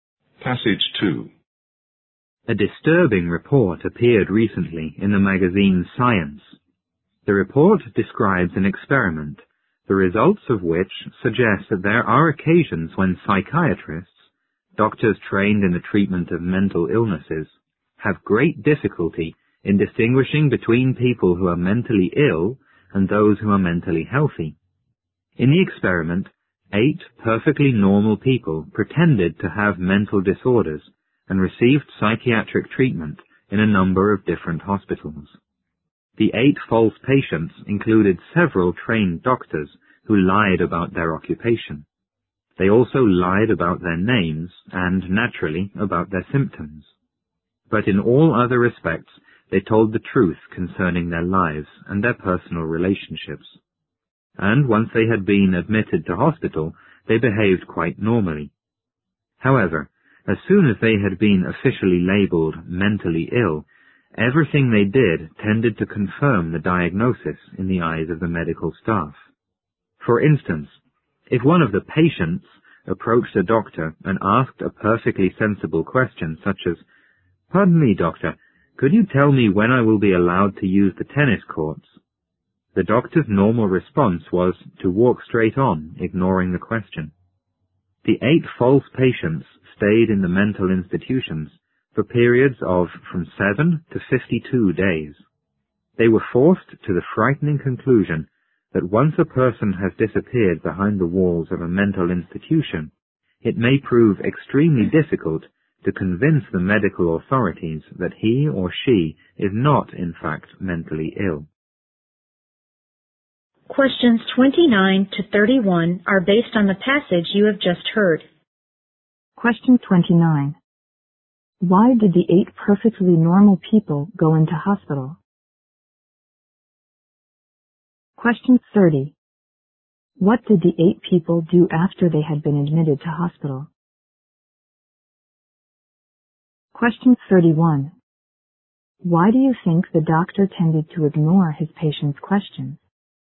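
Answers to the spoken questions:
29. To take part in an experiment by pretending to be mentally ill
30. They behaved quite normally
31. Because he believed the patient was mentally ill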